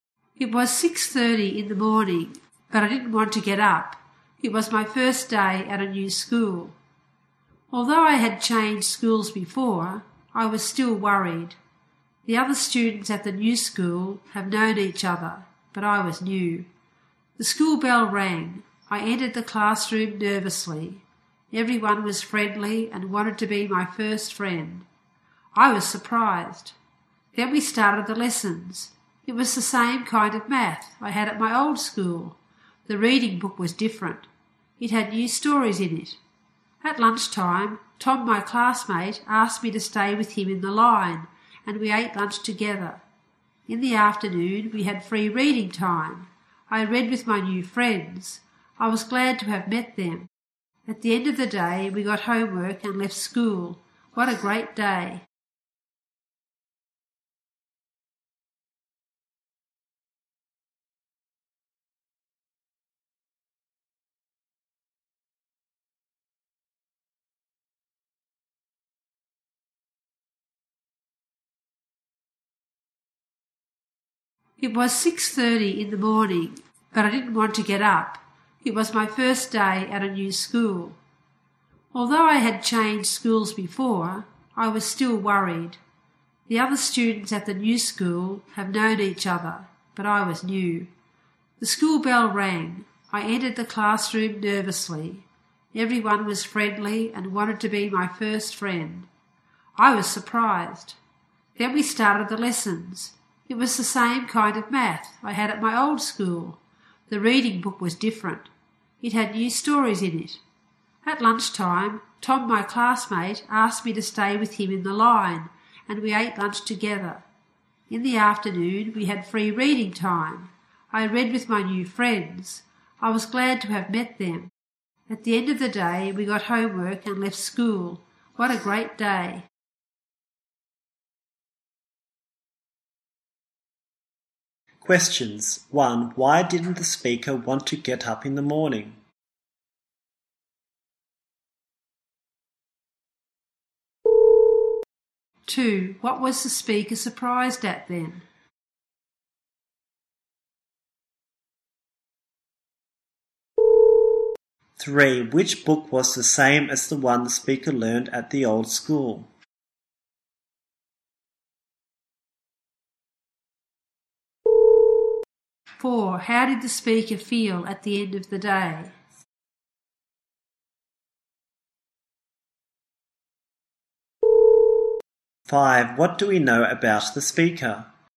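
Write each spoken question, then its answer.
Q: 1. Why didn't the speaker want to get up in the morning?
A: It was the first day at a new school and the speaker was worried

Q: 2. What was the speaker surprised at then?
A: Everyone was friendly and wanted to be the speaker's first friend

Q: 3. Which book was the same as the one the speaker learned at the old school?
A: The math book

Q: 4. How did the speaker feel at the end of the day?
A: Happy; it was a great day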